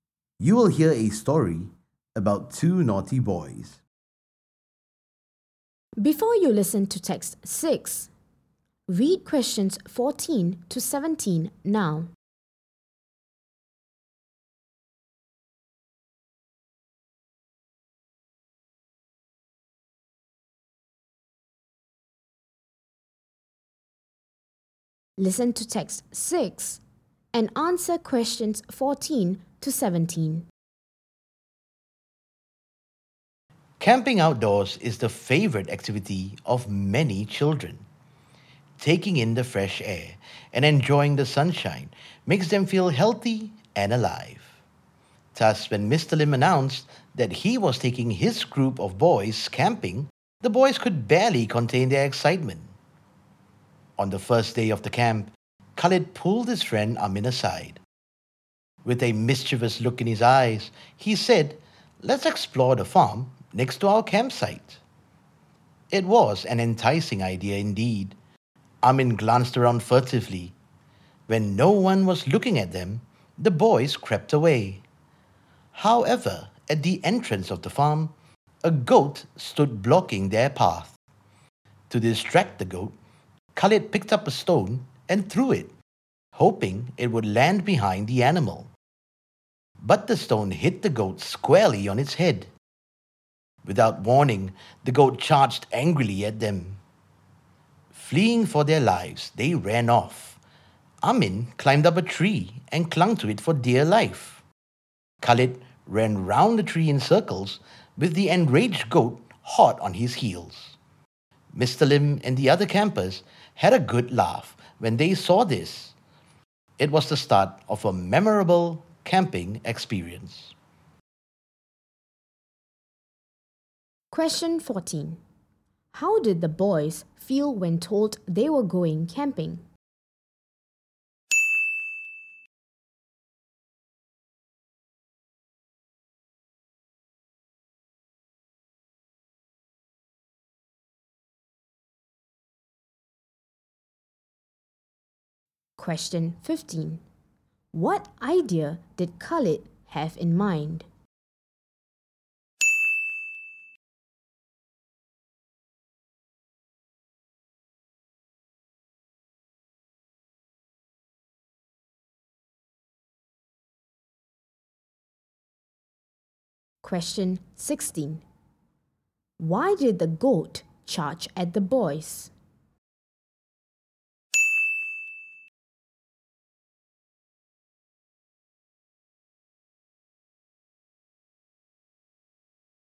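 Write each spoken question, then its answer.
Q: How did the boys feel when told they were going camping?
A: Very excited

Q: What idea did Khalid have in mind?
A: To explore the farm next to their campsite

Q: Why did the goat charge at the boys?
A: Khalid's stone hit the goat on its head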